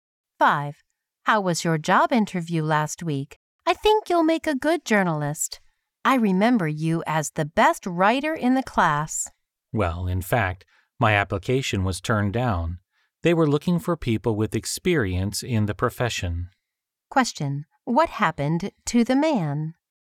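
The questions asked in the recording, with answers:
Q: What happened to the man?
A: His job application was turned down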